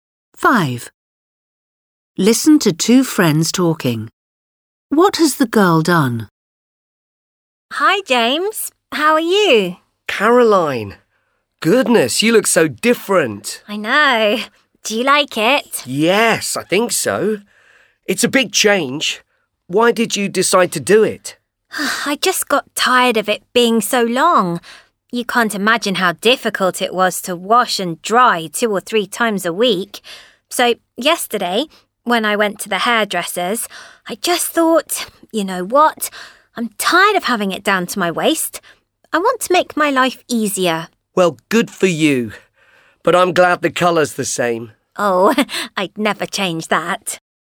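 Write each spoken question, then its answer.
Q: What has the girl done?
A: She has had her long hair cut short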